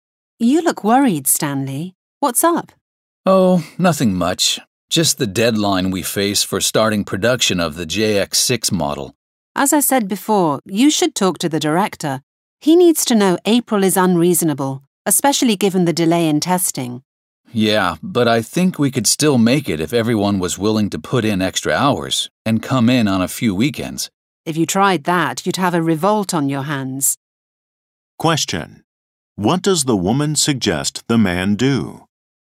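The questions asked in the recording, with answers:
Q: What does the woman suggest the man do?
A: Talk to the director about the unreasonable deadline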